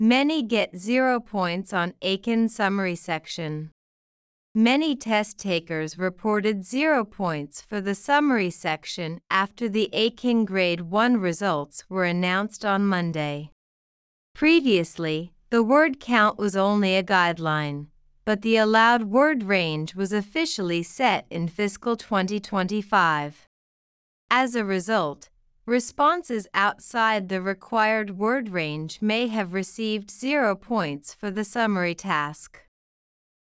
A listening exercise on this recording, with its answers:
次の各英文の内容が本文の説明と合っていたら"True"、違っていたら"False" を選んでください。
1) The word count was only a guideline in fiscal 2024.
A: True

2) Eiken officials said they gave zero points for the summary task by mistake.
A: False

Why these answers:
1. 2番目のセンテンスで、「以前、語数は単なる目安だったが、2025年度に許容される語数範囲が正式に設定された。」と述べています。したがって、新方式が始まる前の2024年度には、語数は単なる目安だったことがわかります。
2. 3番目のセンテンスで、「その結果、指定された語数範囲を外れた解答は、要約課題で0点になった可能性がある。」と述べています。が、英検関係者が「誤って0点を与えたと述べた」という説明はなく、採点ミスだったと公式に認めたわけではありません。

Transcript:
Many test-takers reported zero points for the summary section / after the Eiken Grade 1 results were announced on Monday.
Previously, the word count was only a guideline, / but the allowed word range was officially set in fiscal 2025.
As a result, responses outside the required word range / may have received zero points for the summary task.